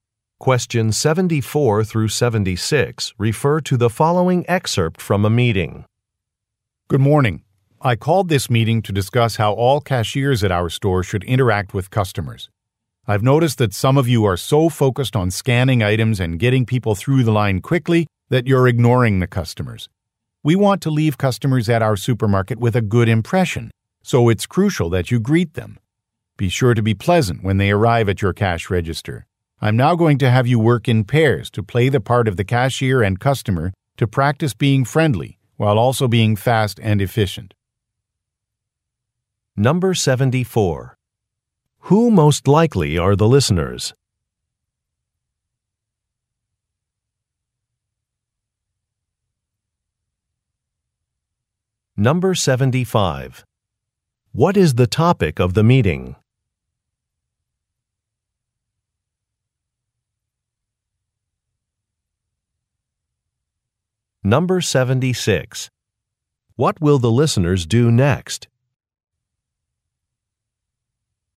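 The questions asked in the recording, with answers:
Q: Who most likely are the listeners?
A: Cashiers at a supermarket

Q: What is the topic of the meeting?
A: How cashiers should interact with customers

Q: What will the listeners do next?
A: Work in pairs to role-play cashier and customer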